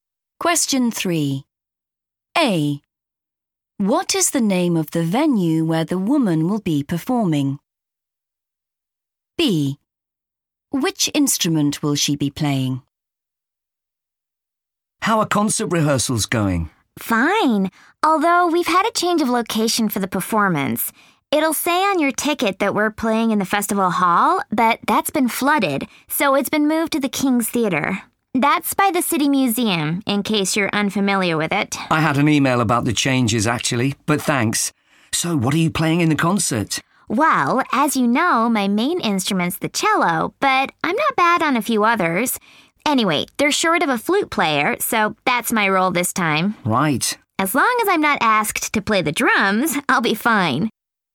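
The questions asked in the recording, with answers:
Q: What is the name of the venue where the woman will be performing?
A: King's Theatre

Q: Which instrument will she be playing?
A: flute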